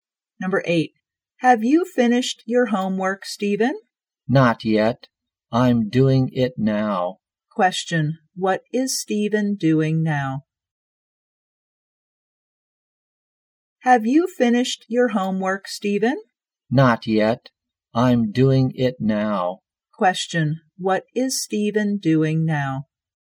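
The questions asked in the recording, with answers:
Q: what is Stephen doing now?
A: Doing his homework.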